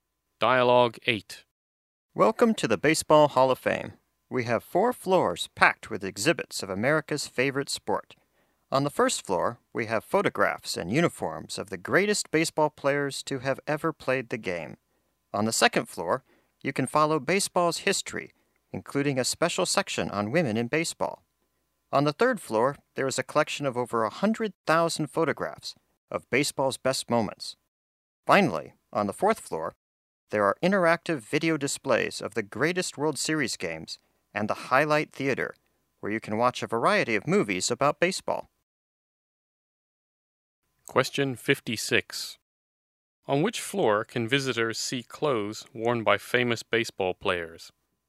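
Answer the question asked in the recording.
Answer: The first floor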